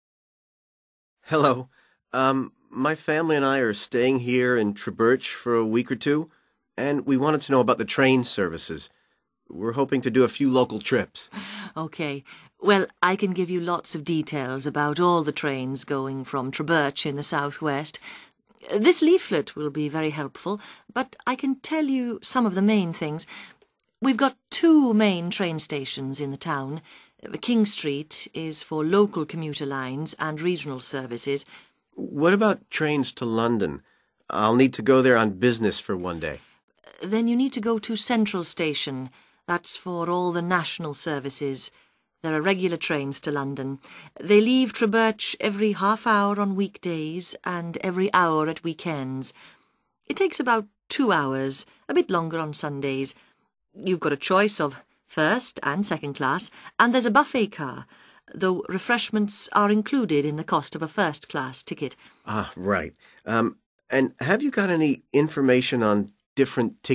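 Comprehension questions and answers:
Complete the sentences below, using NO MORE THAN TWO WORDS AND/OR A NUMBER for each answer.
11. Local services depart from ........................ railway station.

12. National services depart from the ....................... railway station.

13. Trains for London depart every ..................... each day during the week.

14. The price of a first class ticket includes ...................................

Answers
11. King Street
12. Central
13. half hour
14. refreshments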